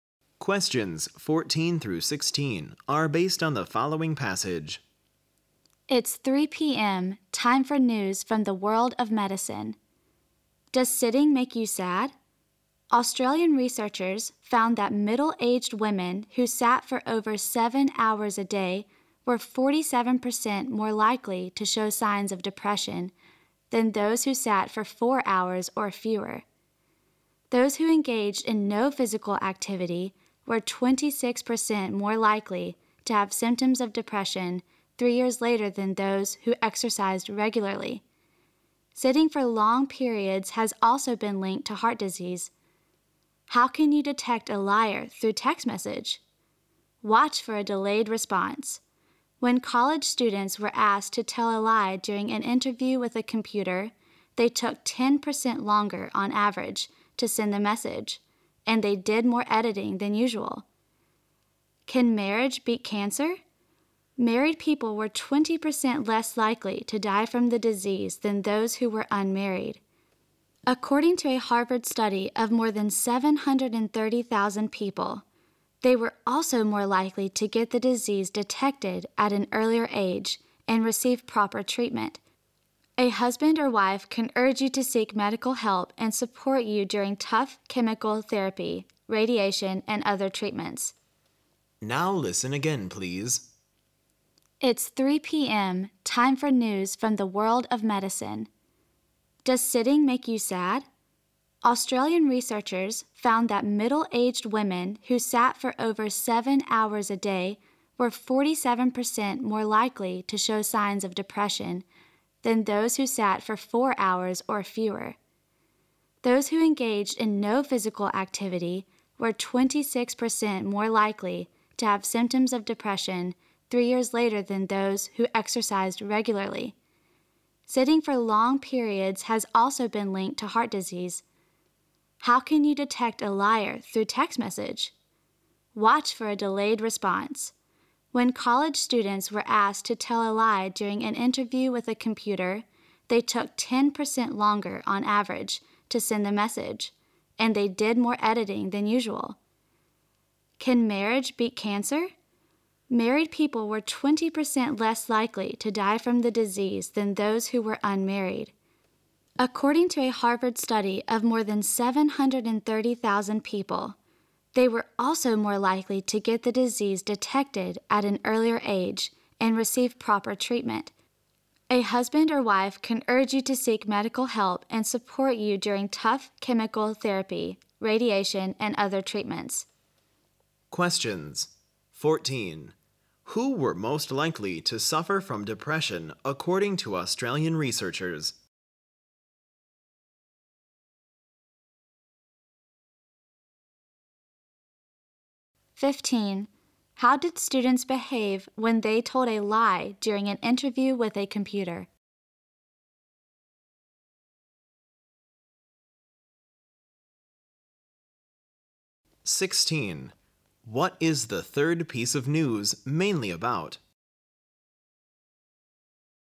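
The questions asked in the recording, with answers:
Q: Who were most likely to suffer from depression according to Australian researchers?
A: Middle-aged women who sat for over 7 hours a day

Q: How did students behave when they told a lie during an interview with a computer?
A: They took longer to reply and did more editing

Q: What is the third piece of news mainly about?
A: Marriage helps people fight cancer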